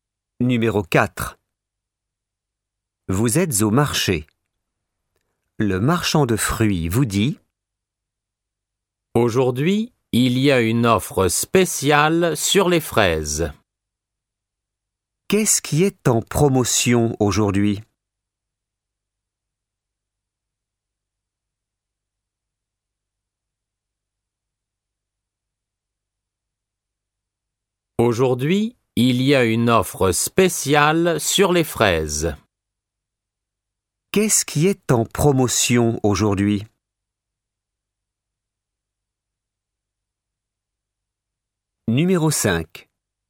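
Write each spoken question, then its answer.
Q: Qu'est-ce qui est en promotion aujourd'hui?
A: Les fraises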